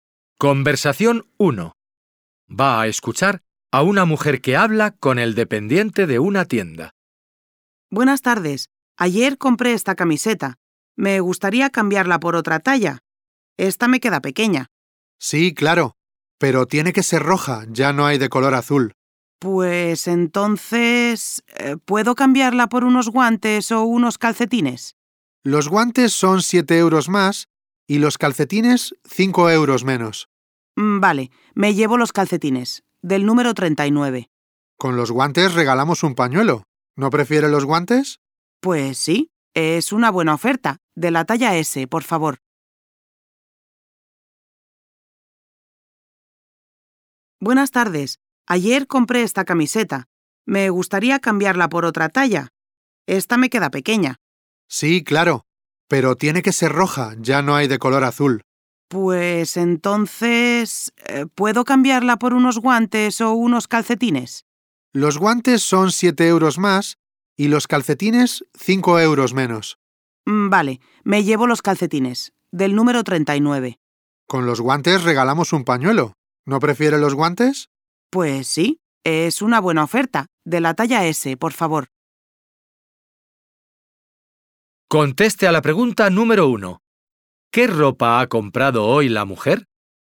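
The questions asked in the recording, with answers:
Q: ¿Qué ropa ha comprado hoy la mujer?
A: Unos guantes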